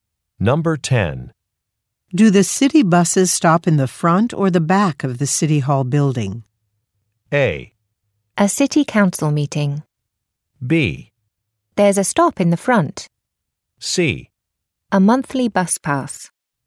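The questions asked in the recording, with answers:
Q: Do the city buses stop in the front or the back of the City Hall building?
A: B: There's a stop in the front.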